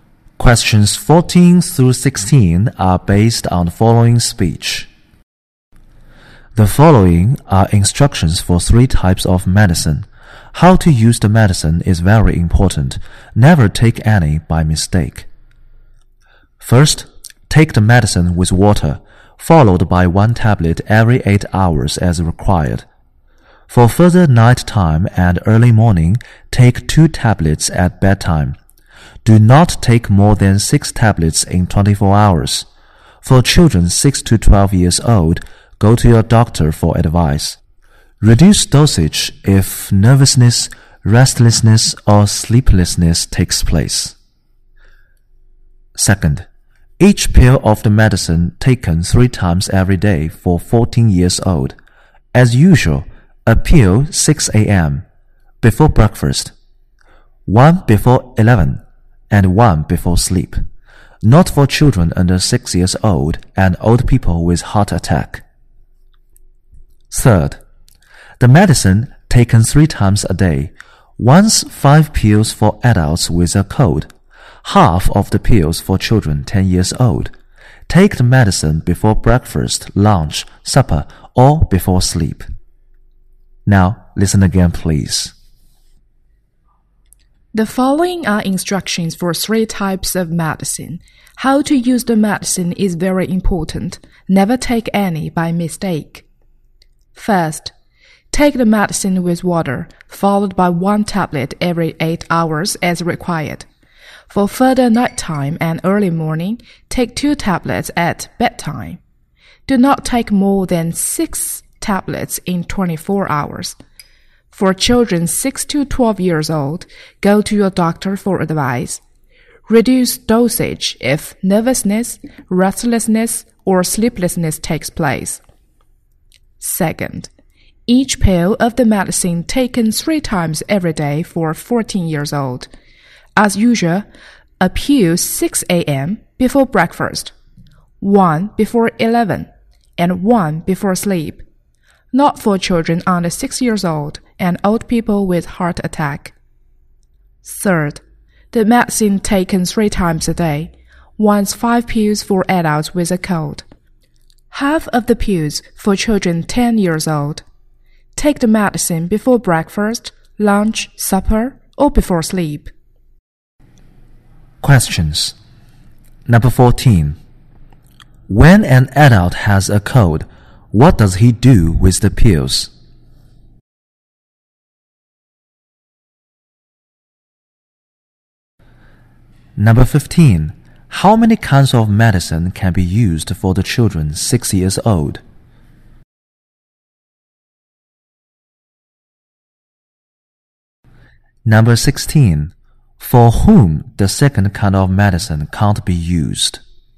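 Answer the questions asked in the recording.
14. Takes 5 pills at a time, three times a day
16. Children under 6 and old people with heart attack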